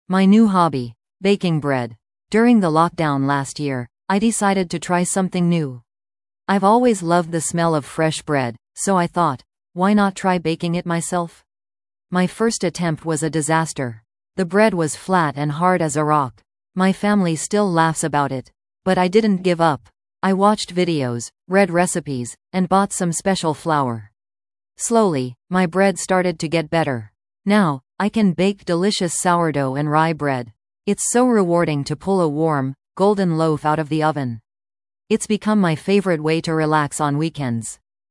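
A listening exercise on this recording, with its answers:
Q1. What new hobby did the speaker start?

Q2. What happened with the speaker's first attempt at baking bread?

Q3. How does the speaker feel about baking bread now?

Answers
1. Baking bread
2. It was a disaster; the bread was flat and hard as a rock
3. It is rewarding and their favorite way to relax on weekends

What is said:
My New Hobby: Baking Bread
During the lockdown last year, I decided to try something new. I've always loved the smell of fresh bread, so I thought, why not try baking it myself? My first attempt was a disaster! The bread was flat and hard as a rock. My family still laughs about it. But I didn't give up. I watched videos, read recipes, and bought some special flour. Slowly, my bread started to get better. Now, I can bake delicious sourdough and rye bread. It's so rewarding to pull a warm, golden loaf out of the oven. 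It's become my favorite way to relax on weekends.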